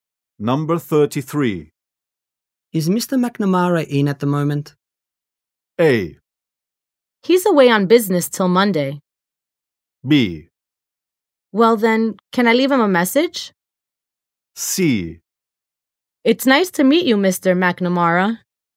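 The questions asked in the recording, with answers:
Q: Is Mr. McNamara in at the moment?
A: A: He's away on business till Monday.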